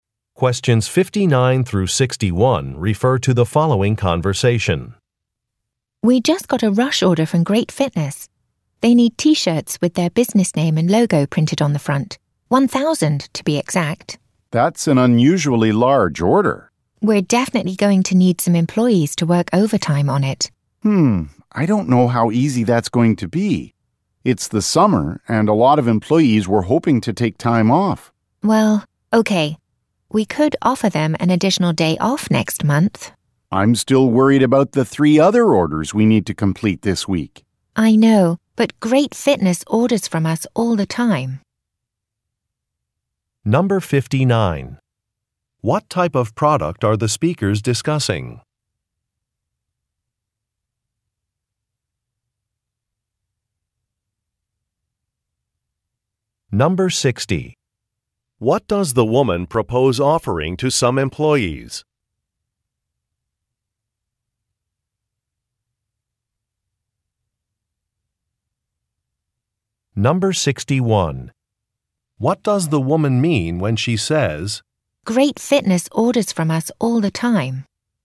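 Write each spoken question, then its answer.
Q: What type of product are the speakers discussing?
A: T-shirts

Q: What does the woman propose offering to some employees?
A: An additional day off next month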